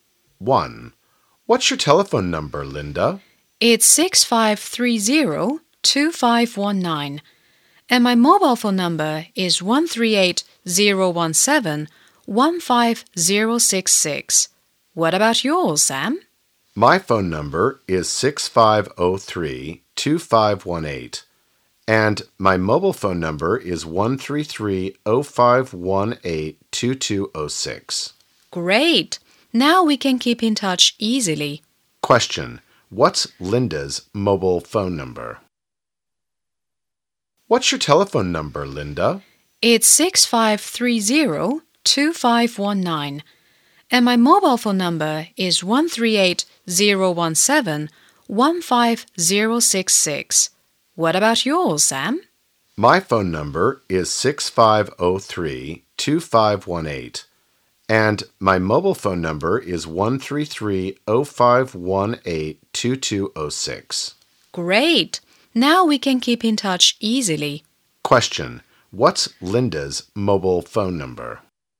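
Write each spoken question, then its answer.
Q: What's Linda's mobile phone number?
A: 138-017-15066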